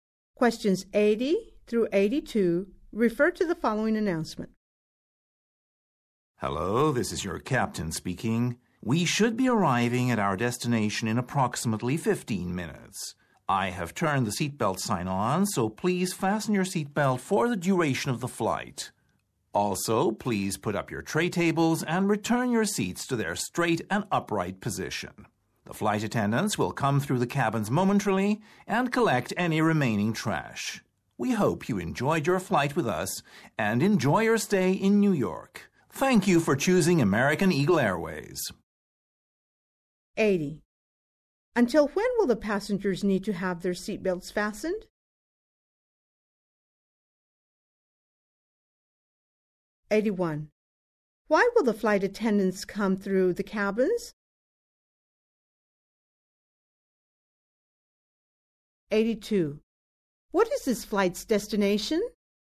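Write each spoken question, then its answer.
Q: Until when will the passengers need to have their seatbelts fastened?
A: Until the end of the flight

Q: Why will the flight attendants come through the cabins?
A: To collect remaining trash

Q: What is this flight's destination?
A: New York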